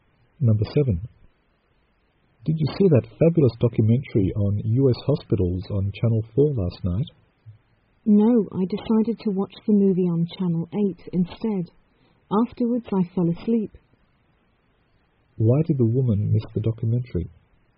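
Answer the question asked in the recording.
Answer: She watched a movie on Channel 8 and then fell asleep.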